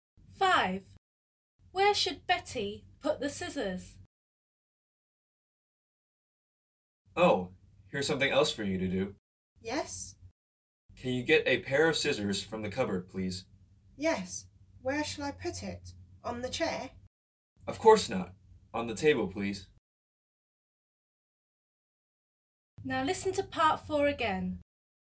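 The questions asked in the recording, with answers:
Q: Where should Betty put the scissors?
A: on the table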